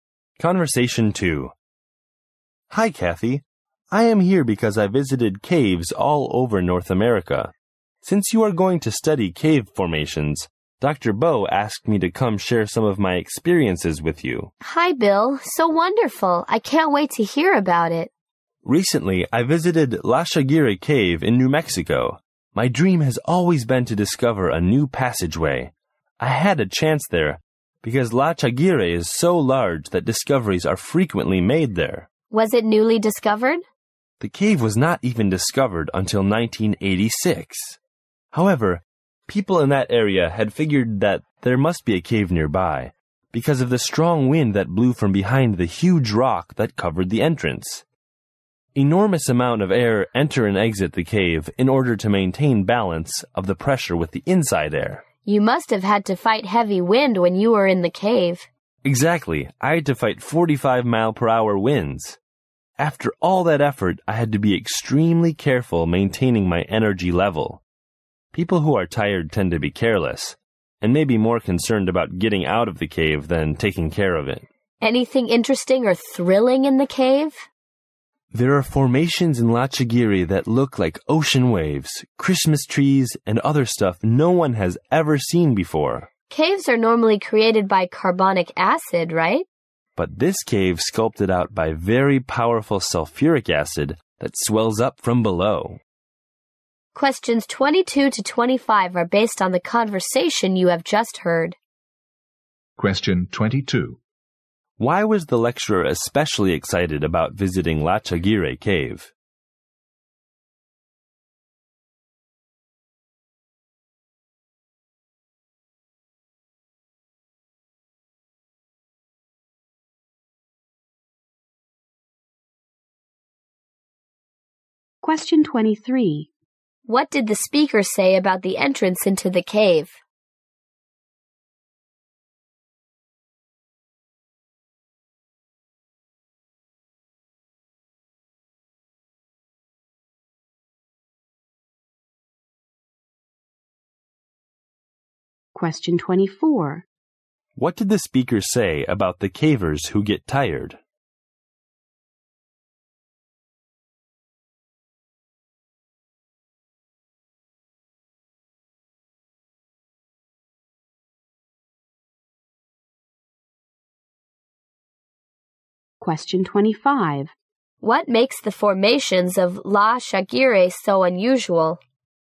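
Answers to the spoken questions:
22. He hoped to discover a new passageway there.
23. It was covered by a huge rock, with strong wind blowing from behind it.
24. They tend to be careless and care more about getting out than protecting the cave.
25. The cave was carved out by sulfuric acid rather than carbonic acid.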